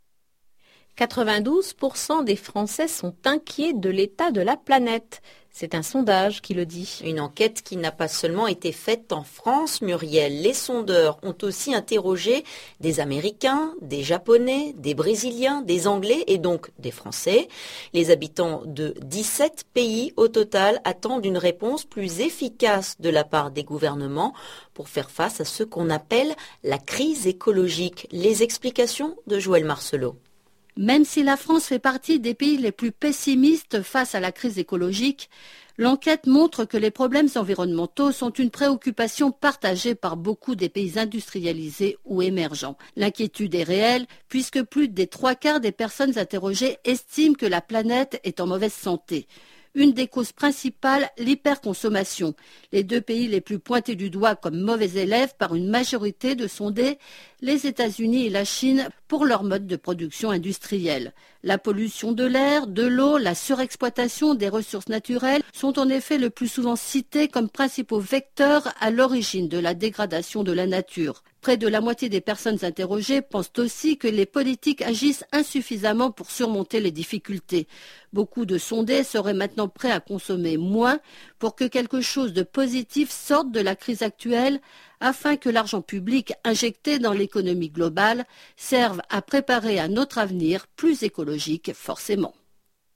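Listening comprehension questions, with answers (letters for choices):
Lisez le questionnaire. Puis écoutez le document sonore et répondez aux questions suivantes.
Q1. Quelle est la cause principale de la dégradation de l'environnement ?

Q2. Cette enquête a été réalisée en Chine.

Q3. Sur la question de l'environnement, les Français sont très optimistes.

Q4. La pollution de l'air et de l'eau dégrade la nature.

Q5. Les ressources naturelles ont été trop exploitées.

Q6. Les personnes sondées n'aimeraient pas que leurs dirigeants aient une politique environnementale car cela coûte trop cher.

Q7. Beaucoup de personnes seraient incapables de diminuer leur consommation.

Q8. Combien de personnes s'inquiètent pour la planète ?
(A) 72%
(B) 82%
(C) 92%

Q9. Les habitants de ___ voudraient une réponse plus efficace des gouvernements.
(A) 7 pays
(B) 17 pays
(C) 27 pays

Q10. ____ des personnes sondées pensent que la planète est en mauvaise santé.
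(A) Environ 3⁄4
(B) 3⁄4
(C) plus des 3⁄4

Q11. ____ des personnes sondées estiment que les dirigeants politiques n'agissent pas assez pour protéger la planète.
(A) Près de la moitié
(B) La moitié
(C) Plus de la moitié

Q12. ____ sont prêtes à consommer moins.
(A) Quelques personnes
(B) Beaucoup de personnes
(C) La plupart des personnes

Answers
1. l'hyperconsommation
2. faux
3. faux
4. vrai
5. vrai
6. faux
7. faux
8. C
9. B
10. C
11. A
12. B

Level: NIVO B1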